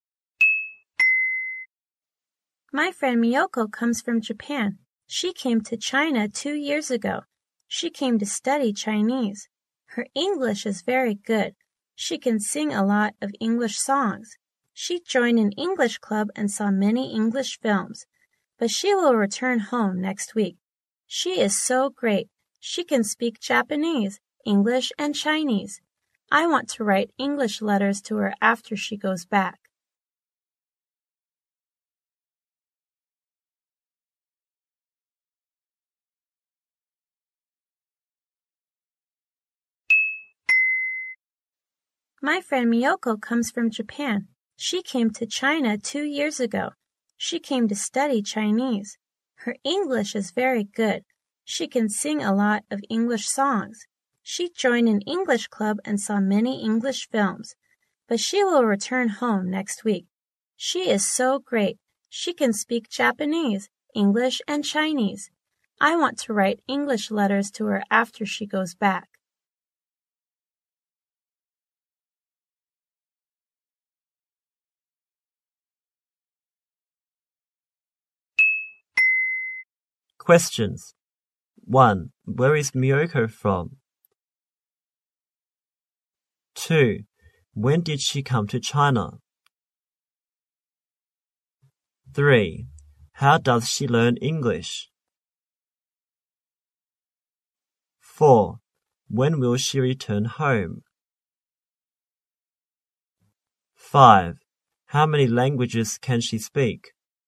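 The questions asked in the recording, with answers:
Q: Where is Miyoko from?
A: Japan

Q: When did she come to China?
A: 2 years ago

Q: When will she return home?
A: Next week

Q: How many languages can she speak?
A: Three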